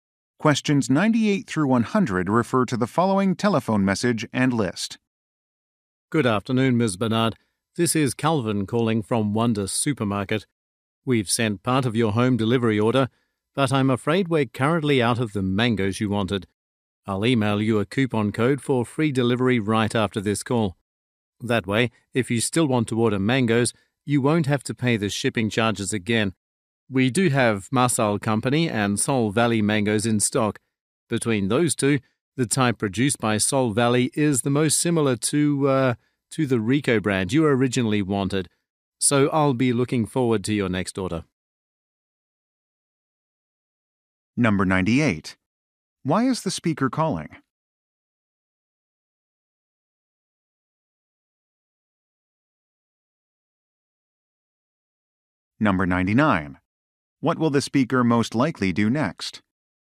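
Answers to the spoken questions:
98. The mangoes ordered are out of stock
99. Email a coupon code for free delivery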